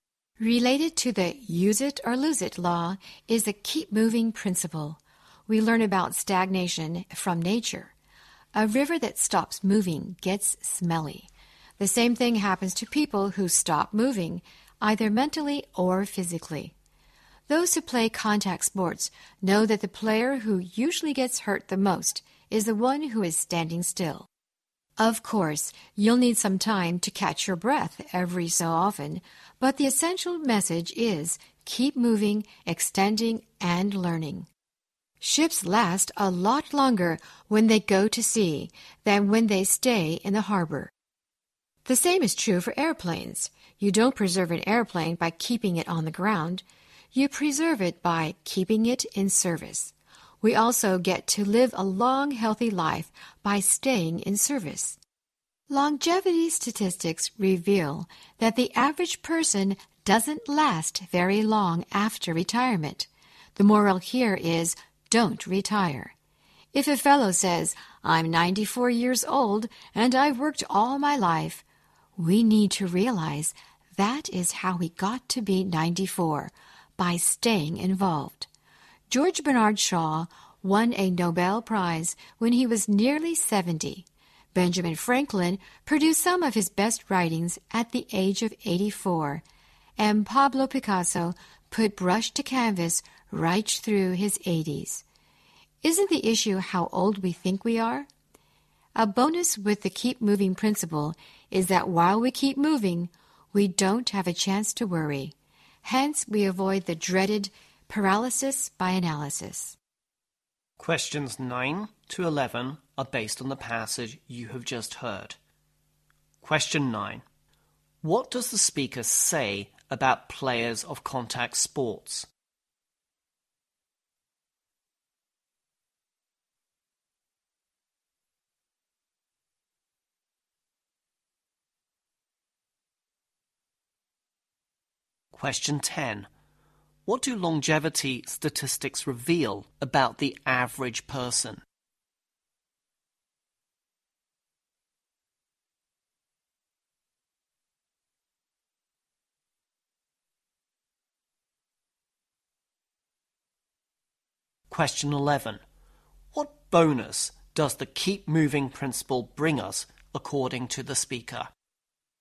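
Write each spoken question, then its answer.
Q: What does the speaker say about players of contact sports?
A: The player who stands still usually gets hurt the most.

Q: What do longevity statistics reveal about the average person?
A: The average person doesn't last very long after retirement.

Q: What bonus does the keep moving principle bring us, according to the speaker?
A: While we keep moving, we don't have a chance to worry.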